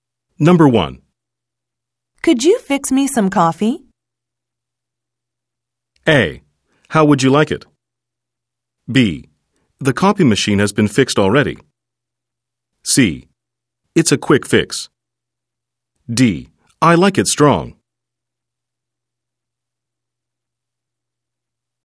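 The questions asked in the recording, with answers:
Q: Could you fix me some coffee?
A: A: How would you like it?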